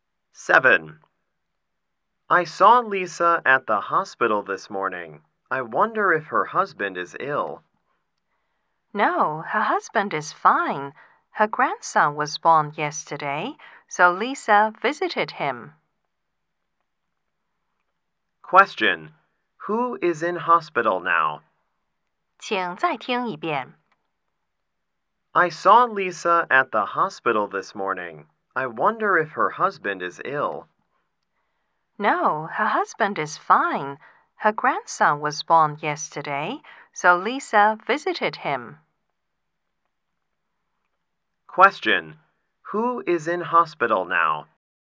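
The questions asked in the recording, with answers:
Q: Who is in hospital now?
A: Lisa's newborn grandson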